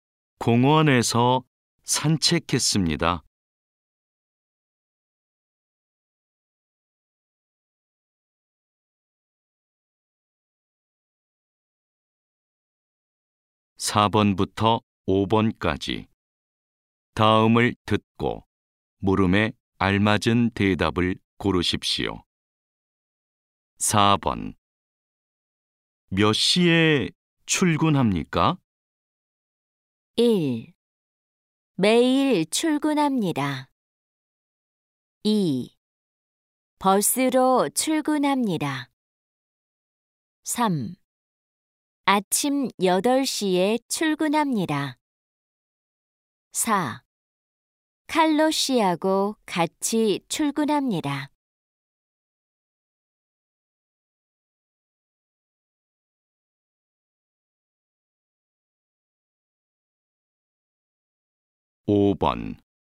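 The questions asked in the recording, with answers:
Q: 몇 시에 출근합니까?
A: 3: 아침 8시에 출근합니다.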